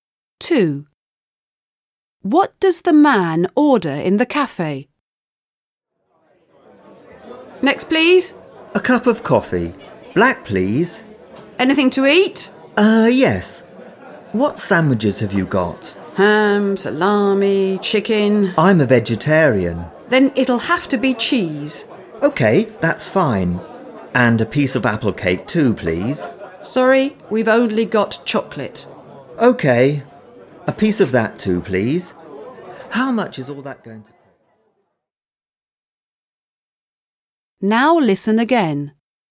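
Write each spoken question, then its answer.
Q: What does the man order in the cafe?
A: Black coffee, a cheese sandwich and a piece of chocolate cake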